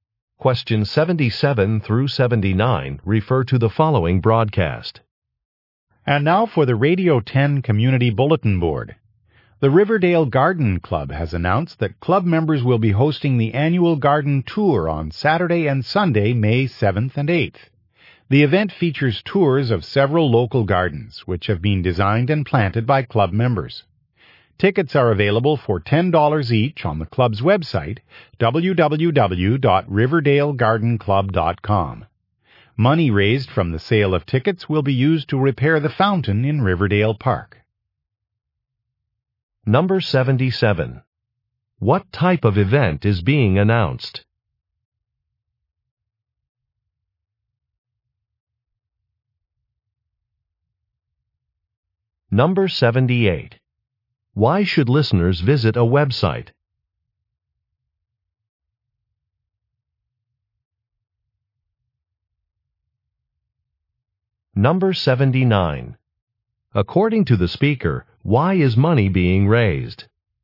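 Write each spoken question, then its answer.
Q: What type of event is being announced?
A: An annual garden tour

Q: Why should listeners visit a website?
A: To buy tickets

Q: According to the speaker, why is money being raised?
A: To repair the fountain in Riverdale Park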